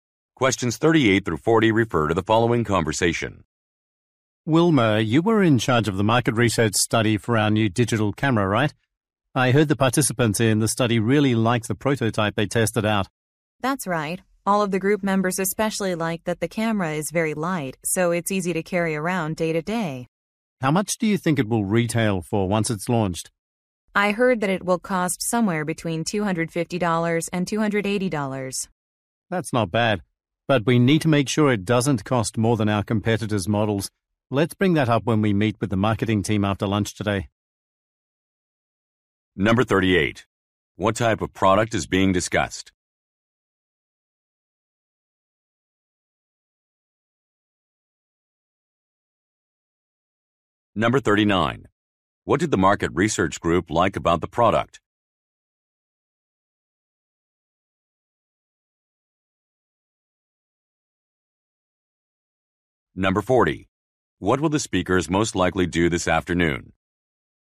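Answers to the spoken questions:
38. A digital camera
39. It is light and easy to carry
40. Meet with the marketing team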